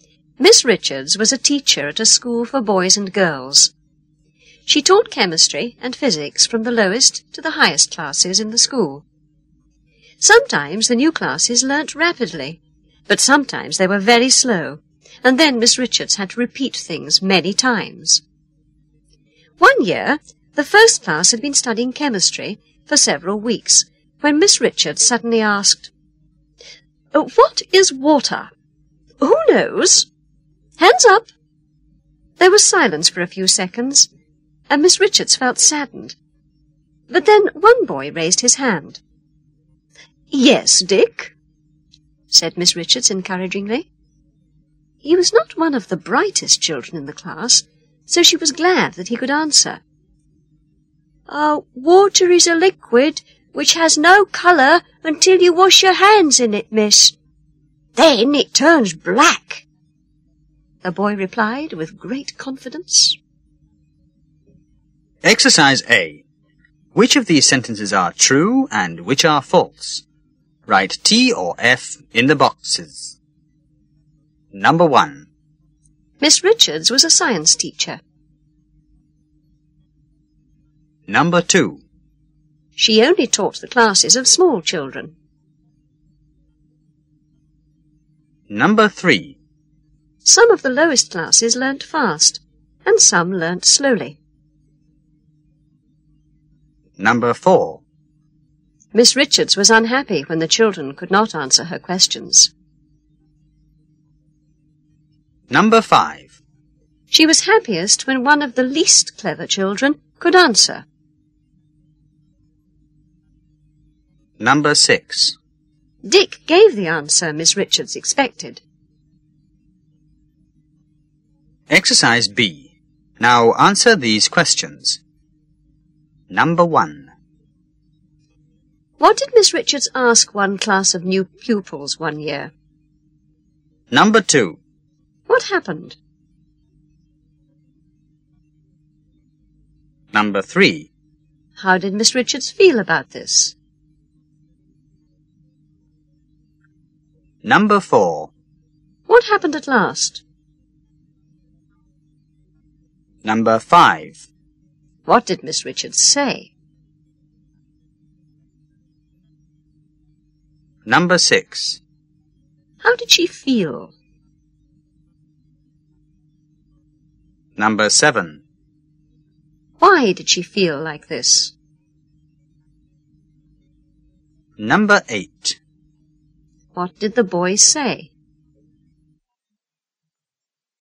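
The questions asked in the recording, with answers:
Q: Miss Richards was a science teacher.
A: True

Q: She only taught the classes of small children.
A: False

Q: Some of the lowest classes learnt fast, and some learnt slowly.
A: True

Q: Miss Richards was unhappy when the children could not answer her questions.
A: True

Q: Dick gave the answer Miss Richards expected.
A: False

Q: What did Miss Richards ask one class of new pupils one year?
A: What is water?

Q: What happened?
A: There was silence for a few seconds.

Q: How did Miss Richards feel about this?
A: Saddened.

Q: What happened at last?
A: One boy, Dick, raised his hand.

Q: What did Miss Richards say?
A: "Yes, Dick."

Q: How did she feel?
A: Glad.

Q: Why did she feel like this?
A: Because he was not one of the brightest children, but he could answer.

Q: What did the boy say?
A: Water is a liquid which has no colour until you wash your hands in it; then it turns black.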